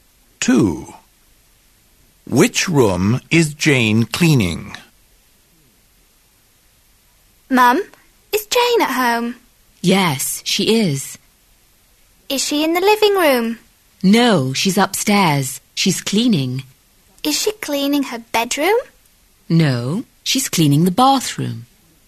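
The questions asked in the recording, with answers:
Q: Which room is Jane cleaning?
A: The bathroom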